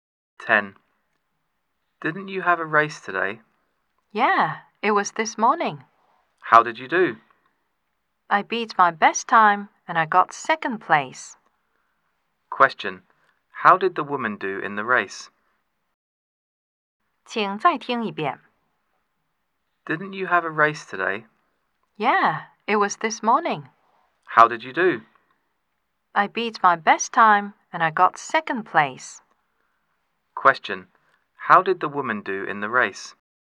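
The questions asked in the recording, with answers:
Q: How did the woman do in the race?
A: She beat her best time and got second place.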